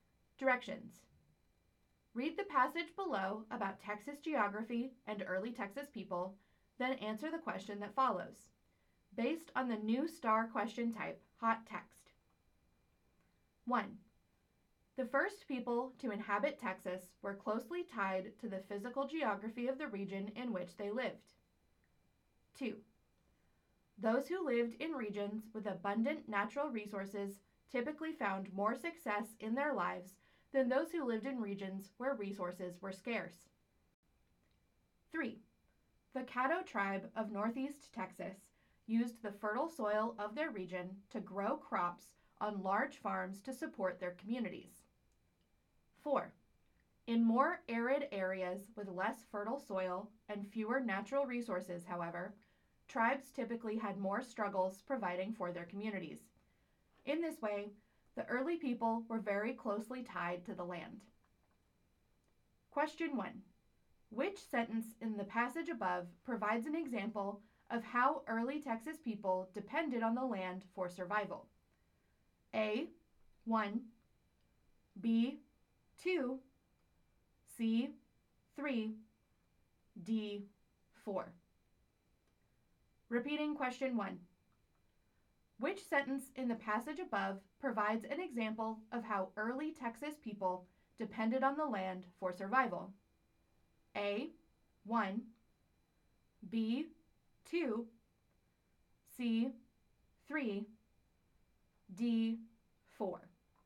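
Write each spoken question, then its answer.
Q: Which sentence in the passage above provides an example of how early Texas people depended on the land for survival?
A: C: 3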